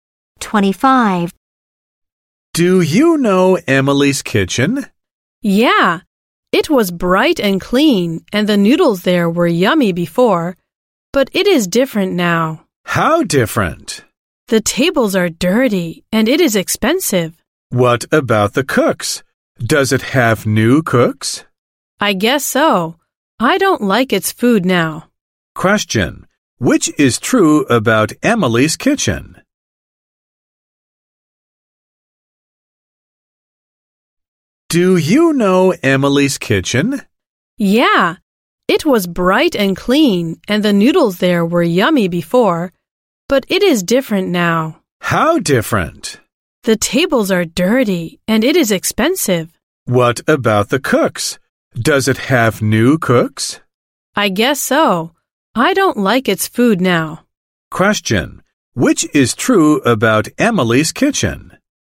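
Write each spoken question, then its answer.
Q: which is true about Emily's kitchen?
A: Its tables are dirty now and it is expensive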